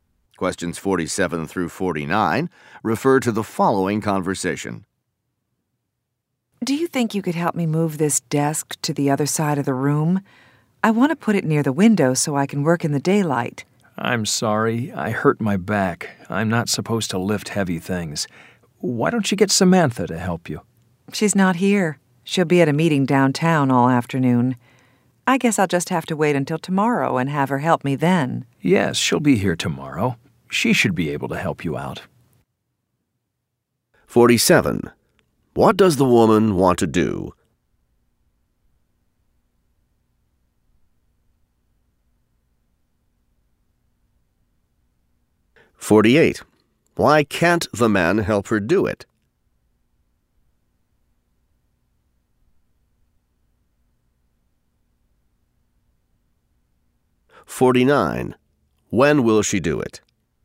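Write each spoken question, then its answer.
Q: What does the woman want to do?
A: Move her desk near the window

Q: Why can't the man help her do it?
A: He hurt his back

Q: When will she do it?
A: Tomorrow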